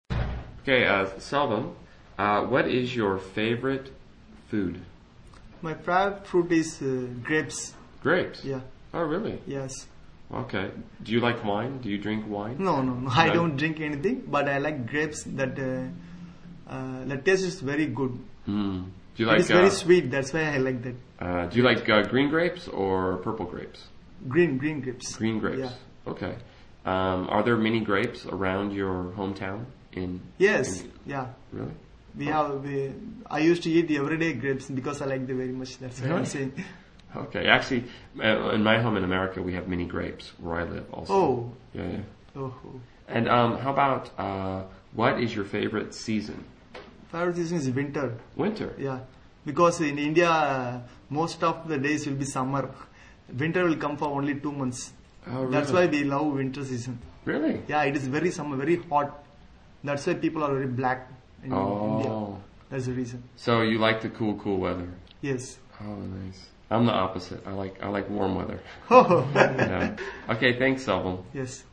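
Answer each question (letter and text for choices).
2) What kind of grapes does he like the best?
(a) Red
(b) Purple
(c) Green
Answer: (c) Green

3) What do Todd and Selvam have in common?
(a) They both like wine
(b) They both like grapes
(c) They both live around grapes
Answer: (c) They both live around grapes

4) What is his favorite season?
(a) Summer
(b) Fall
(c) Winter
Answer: (c) Winter

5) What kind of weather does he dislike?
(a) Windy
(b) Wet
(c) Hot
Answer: (c) Hot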